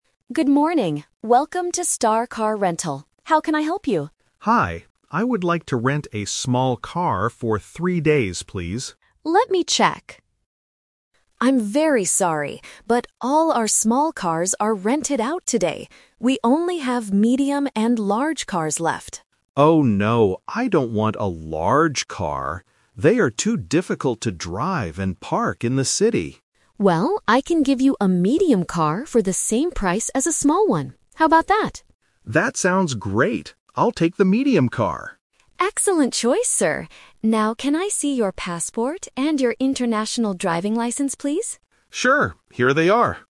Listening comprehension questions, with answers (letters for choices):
Listen to a conversation between a tourist and a car rental agent. Choose the correct answer (A, B, or C) for each question.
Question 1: What size car does the tourist finally rent?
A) A small car.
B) A medium car.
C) A large car.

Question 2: How long will the tourist keep the car?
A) For two days.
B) For three days.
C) For four days.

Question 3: What important document does the agent ask to see?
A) A hotel booking.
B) A credit card.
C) A driving license.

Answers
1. B
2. B
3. C

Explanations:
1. This is The Twist. The tourist initially asks for a "small car", but they are sold out. He refuses the "large car" because it is hard to park. Finally, he agrees to take the "medium car" because it is the same price. Option (A) is his original wish. Option (C) is the one he rejected.
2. The tourist clearly states, "I would like to rent a small car for three days, please." Options (A) and (C) are not mentioned in the audio.
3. The agent says, "can I see your passport and your international driving license, please?" Option (C) matches this request. Options (A) and (B) are common things needed for travel, but they are not mentioned in this conversation.

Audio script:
Agent: Good morning. Welcome to Star Car Rental. How can I help you?
Tourist: Hi. I would like to rent a small car for three days, please.
Agent: Let me check... I'm very sorry, but all our small cars are rented out today. We only have medium and large cars left.
Tourist: Oh, no. I don't want a large car. They are too difficult to drive and park in the city.
Agent: Well, I can give you a medium car for the same price as a small one. How about that?"
Tourist: That sounds great! I'll take the medium car.
Agent: Excellent choice, sir. Now, can I see your passport and your international driving license, please?